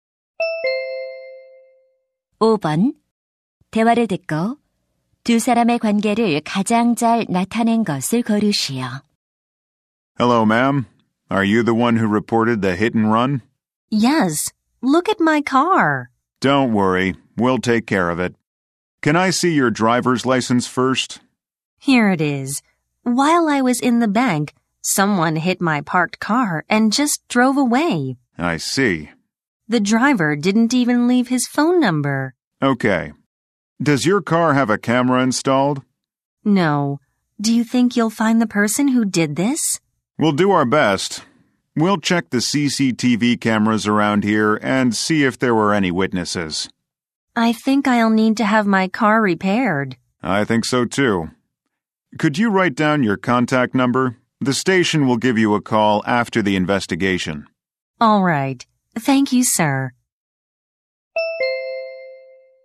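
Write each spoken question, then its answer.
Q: 대화를 듣고 두 사람의 관계를 가장 잘 나타낸 것을 고르시오.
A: 경찰관 - 뺑소니 피해자(신고자)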